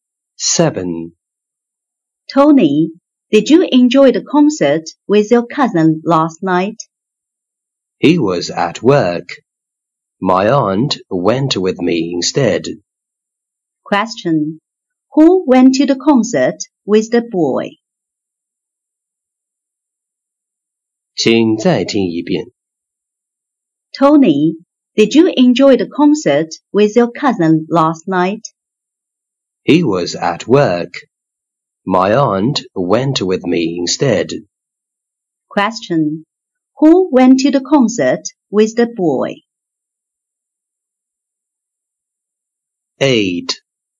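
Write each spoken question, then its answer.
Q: Who went to the concert with the boy?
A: His aunt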